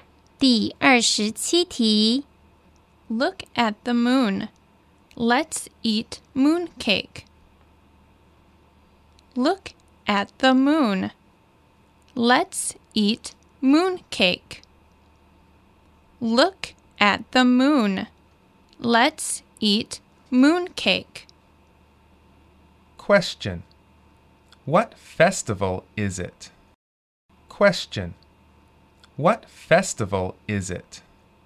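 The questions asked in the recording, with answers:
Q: What festival is it?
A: Moon Festival (Mid-Autumn Festival)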